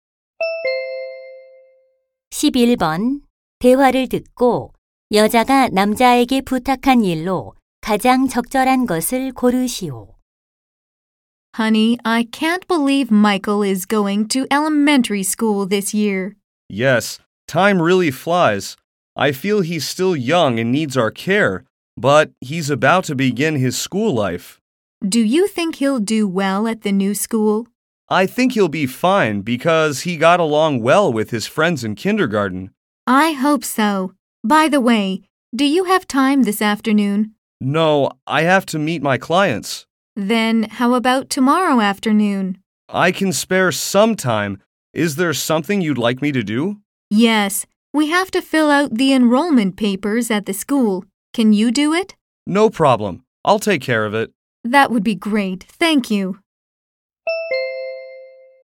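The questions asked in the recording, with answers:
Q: 대화를 듣고 여자가 남자에게 부탁한 일로 가장 적절한 것을 고르시오.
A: 학교 입학 서류 작성하기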